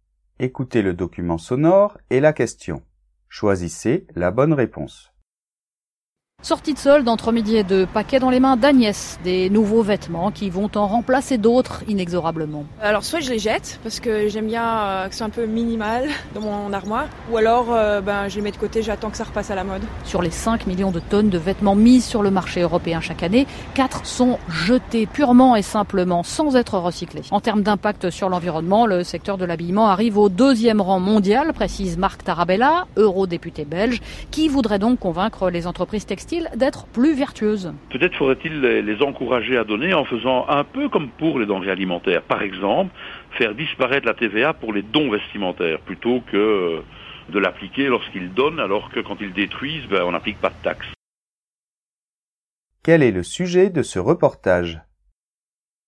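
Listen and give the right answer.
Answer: Le gaspillage des vêtements jetés sans être recyclés et son impact environnemental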